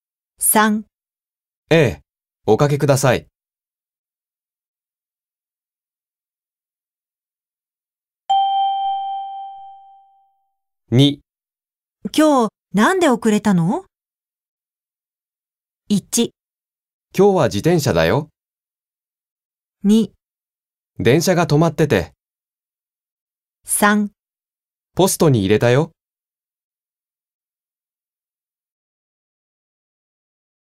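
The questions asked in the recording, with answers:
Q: 今日、なんで遅れたの?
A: 2: 電車が止まってて。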